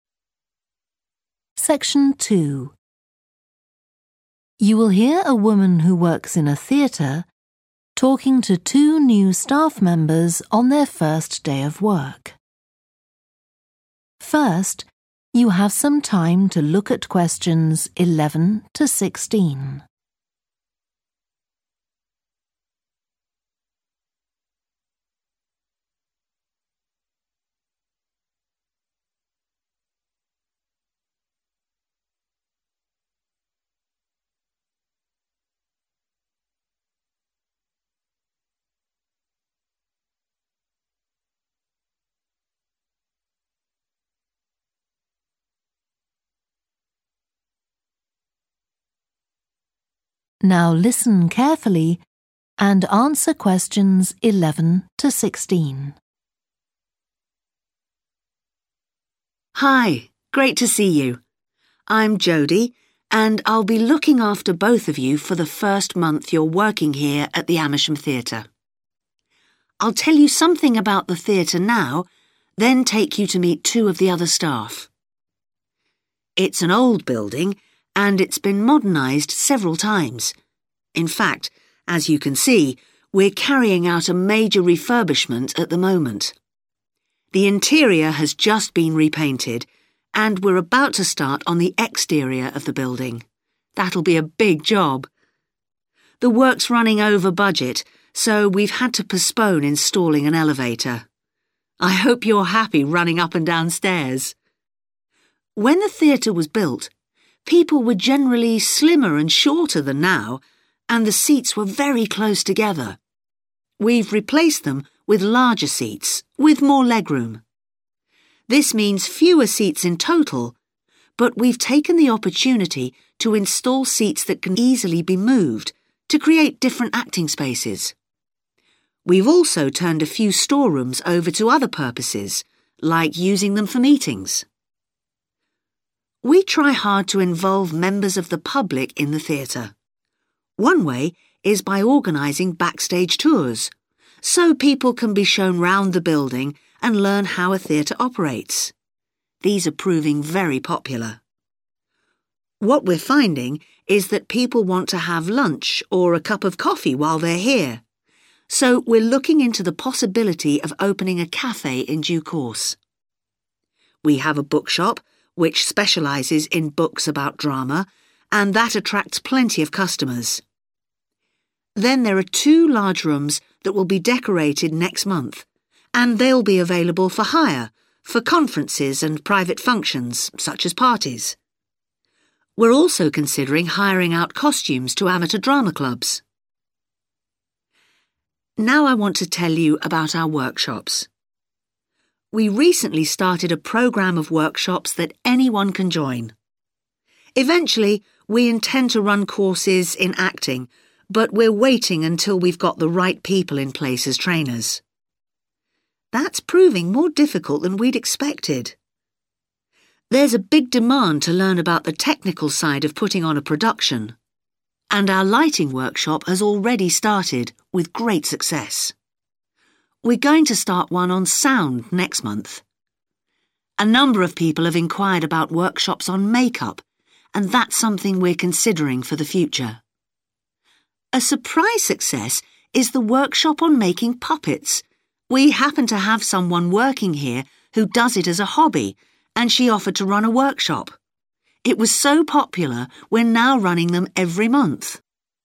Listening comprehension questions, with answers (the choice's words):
Choose TWO letters, A-E.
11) Which TWO changes have been made so far during the refurbishment of the theatre?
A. Some rooms now have a different use.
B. A different type of seating has been installed.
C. An elevator has been installed.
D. The outside of the building has been repaired.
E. Extra seats have been added.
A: Some rooms now have a different use.

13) Which TWO facilities does the theatre currently offer to the public?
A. rooms for hire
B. backstage tours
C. hire of costumes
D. a bookshop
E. a café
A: backstage tours

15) Which TWO workshops does the theatre currently offer?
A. sound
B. acting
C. making puppets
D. make-up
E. lighting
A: making puppets

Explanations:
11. The transcript talks about how larger seats with more legroom have replaced old seats, resulting in fewer seats overall. Additionally, some rooms that used to be for storage are now being used for meetings.
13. The transcript mentions two facilities that the theatre currently offers to the public: backstage tours and a bookshop that sells drama-related books.
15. The transcript talks about two specific workshops. One is about lighting, which has already begun successfully. The other is about making puppets, which was unexpectedly popular and is now held monthly.

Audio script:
Hi. Great to see you! I'm Jody, and I'll be look after both of you for the first month you're working here at the Amersham Theatre. I'll tell you something about the theatre now, then take you to meet two of the other staff.
It's an old building, and it's been modernised several times. In fact, as you can see, we're carrying out a major refurbishment at the moment. The interior has just been repainted, and we're about to start on the exterior of the building – that'll be a big job. The work's running over budget, so we've had to postpone installing an elevator. I hope you're happy running up and down stairs! When the theatre was built, people were generally slimmer and shorter than now, and the seats were very close together. We've replaced them with larger seats, with more legroom. This means fewer seats in total, but we've taken the opportunity to install seats that can easily be moved, to create different acting spaces. We've also turned a few storerooms over to other purposes like using them for meetings.
We try hard to involve members of the public in the theatre. One way is by organising backstage tours so people can be shown round the building and learn how a theatre operates. These are proving very popular. What we're finding is that people want to have lunch or a cup of coffee while they're here, so we're looking into the possibility of opening a café in due course. We have a bookshop, which specialises in books about drama and that attracts plenty of customers. Then there are two large rooms that will be decorated next month, and they'll be available for hire, for conferences and private functions, such as parties. We're also considering hiring out costumes to amateur drama clubs.
Now I want to tell you about our workshops. We recently started a programme of workshops that anyone can join. Eventually we intend to run courses in acting, but we're waiting until we've got the right people in place as trainers. That's proving more difficult than we'd expected! There's a big demand to learn about the technical side of putting on a production, and our lighting workshop has already started with great success. We're going to start one on sound next month. A number of people have enquired about workshops on make-up, and that's something we're considering for the future. A surprise success is the workshop on making puppets – we happen to have someone working here who does it as a hobby, and she offered to run a workshop. It was so popular we're now running them every month!